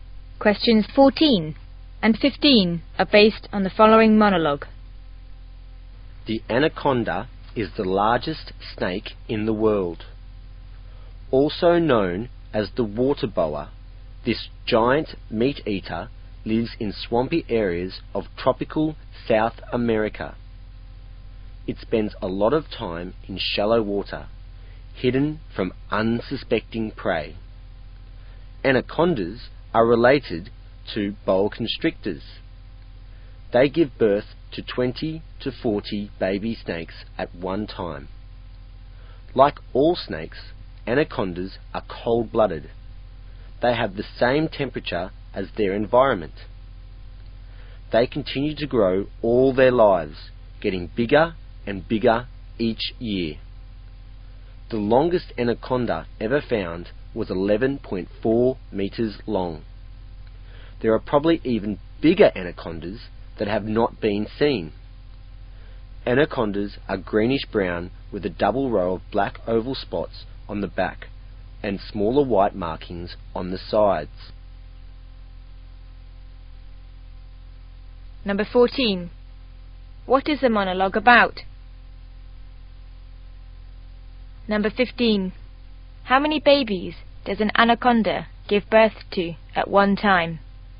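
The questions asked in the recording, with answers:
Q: What is the monologue about?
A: The anaconda

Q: How many babies does an anaconda give birth to at one time?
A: 20 to 40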